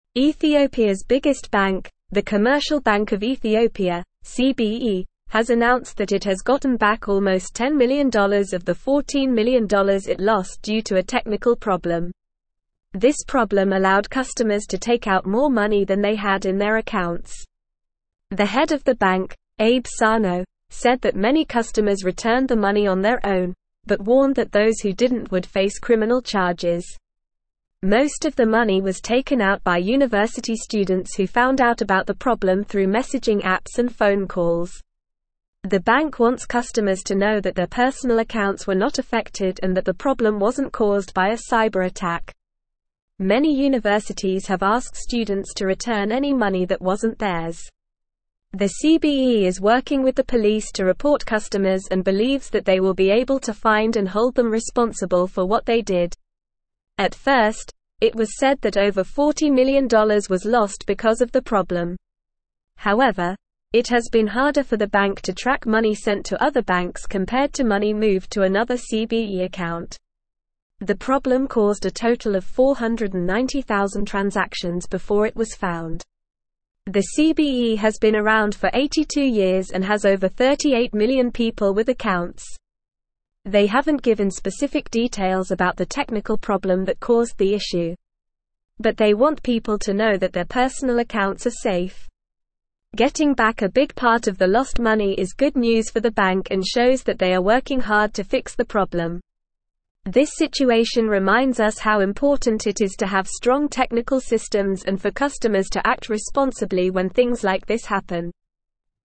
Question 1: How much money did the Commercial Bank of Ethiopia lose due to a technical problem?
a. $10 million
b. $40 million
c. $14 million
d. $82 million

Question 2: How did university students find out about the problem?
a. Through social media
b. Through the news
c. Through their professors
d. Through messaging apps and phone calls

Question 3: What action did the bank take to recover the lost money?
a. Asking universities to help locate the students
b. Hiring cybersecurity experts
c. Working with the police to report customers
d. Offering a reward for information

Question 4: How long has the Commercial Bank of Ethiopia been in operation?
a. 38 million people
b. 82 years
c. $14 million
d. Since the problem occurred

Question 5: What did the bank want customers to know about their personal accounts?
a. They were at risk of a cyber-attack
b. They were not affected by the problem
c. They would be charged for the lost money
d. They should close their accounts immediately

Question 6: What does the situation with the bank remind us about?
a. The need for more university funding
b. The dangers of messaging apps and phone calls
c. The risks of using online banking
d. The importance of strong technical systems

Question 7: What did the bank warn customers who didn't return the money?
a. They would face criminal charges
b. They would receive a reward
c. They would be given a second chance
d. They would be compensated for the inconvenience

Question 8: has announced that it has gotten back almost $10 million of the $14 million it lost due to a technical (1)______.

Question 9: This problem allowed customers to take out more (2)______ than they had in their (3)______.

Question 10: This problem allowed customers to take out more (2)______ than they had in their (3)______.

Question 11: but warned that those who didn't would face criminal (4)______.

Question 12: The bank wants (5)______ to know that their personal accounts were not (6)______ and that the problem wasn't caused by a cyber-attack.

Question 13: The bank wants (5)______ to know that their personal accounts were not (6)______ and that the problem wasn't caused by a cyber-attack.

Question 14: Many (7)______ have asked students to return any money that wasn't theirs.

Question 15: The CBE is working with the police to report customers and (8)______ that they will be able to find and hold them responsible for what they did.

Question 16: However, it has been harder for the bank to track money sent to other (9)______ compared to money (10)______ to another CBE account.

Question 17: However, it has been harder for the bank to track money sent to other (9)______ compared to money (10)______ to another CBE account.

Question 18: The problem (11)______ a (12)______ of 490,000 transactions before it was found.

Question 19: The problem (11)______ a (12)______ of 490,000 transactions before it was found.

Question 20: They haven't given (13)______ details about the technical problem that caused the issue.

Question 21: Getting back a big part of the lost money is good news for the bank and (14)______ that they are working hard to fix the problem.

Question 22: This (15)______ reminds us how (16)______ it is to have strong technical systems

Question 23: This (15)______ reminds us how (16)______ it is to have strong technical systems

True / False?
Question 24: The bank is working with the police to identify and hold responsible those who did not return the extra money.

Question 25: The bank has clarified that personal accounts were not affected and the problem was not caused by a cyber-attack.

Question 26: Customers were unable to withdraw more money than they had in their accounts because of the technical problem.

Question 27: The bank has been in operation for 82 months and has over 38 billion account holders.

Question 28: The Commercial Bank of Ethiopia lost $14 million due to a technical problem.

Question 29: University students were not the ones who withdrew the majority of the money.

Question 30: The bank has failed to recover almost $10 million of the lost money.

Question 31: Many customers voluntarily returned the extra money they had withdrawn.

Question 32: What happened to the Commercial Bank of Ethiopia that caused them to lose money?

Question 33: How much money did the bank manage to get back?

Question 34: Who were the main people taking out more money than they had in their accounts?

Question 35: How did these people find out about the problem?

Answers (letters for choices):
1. c
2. d
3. c
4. b
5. b
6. d
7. a
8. problem
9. money
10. accounts
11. charges
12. customers
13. affected
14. universities
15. believes
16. banks
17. moved
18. caused
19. total
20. specific
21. shows
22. situation
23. important
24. True
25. True
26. False
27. False
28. True
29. False
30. False
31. True
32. The bank experienced a technical problem that allowed customers to withdraw more money than they had in their accounts.
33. The bank has recovered almost $10 million of the $14 million it lost.
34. University students were the main people taking out more money than they had in their accounts.
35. They found out about the problem through messaging apps and phone calls.

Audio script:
Ethiopia's biggest bank, the Commercial Bank of Ethiopia (CBE), has announced that it has gotten back almost $10 million of the $14 million it lost due to a technical problem. This problem allowed customers to take out more money than they had in their accounts. The head of the bank, Abe Sano, said that many customers returned the money on their own, but warned that those who didn't would face criminal charges. Most of the money was taken out by university students who found out about the problem through messaging apps and phone calls. The bank wants customers to know that their personal accounts were not affected and that the problem wasn't caused by a cyber-attack.
Many universities have asked students to return any money that wasn't theirs. The CBE is working with the police to report customers and believes that they will be able to find and hold them responsible for what they did. At first, it was said that over $40 million was lost because of the problem. However, it has been harder for the bank to track money sent to other banks compared to money moved to another CBE account. The problem caused a total of 490,000 transactions before it was found.
The CBE has been around for 82 years and has over 38 million people with accounts. They haven't given specific details about the technical problem that caused the issue. But they want people to know that their personal accounts are safe. Getting back a big part of the lost money is good news for the bank and shows that they are working hard to fix the problem. This situation reminds us how important it is to have strong technical systems and for customers to act responsibly when things like this happen.

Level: Level 3